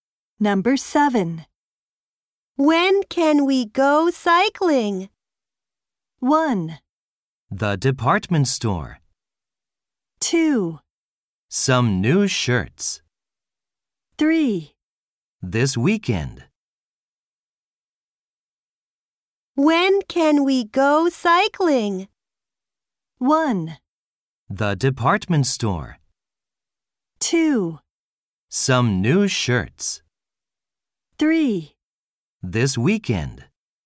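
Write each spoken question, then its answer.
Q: When can we go cycling?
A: 3: This weekend.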